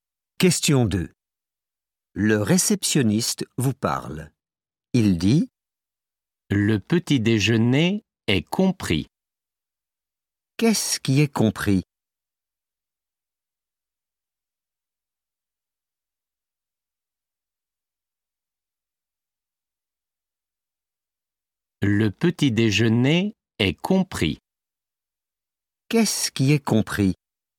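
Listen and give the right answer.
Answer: Le petit déjeuner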